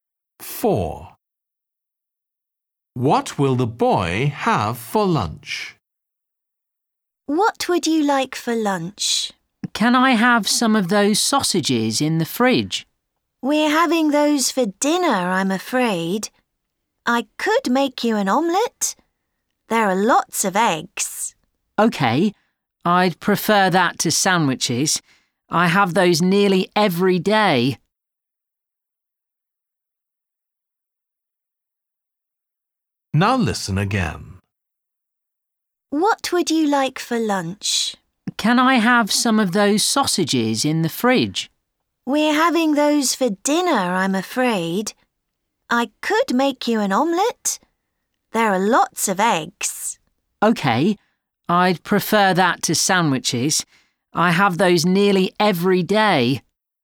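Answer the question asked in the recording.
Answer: an omelette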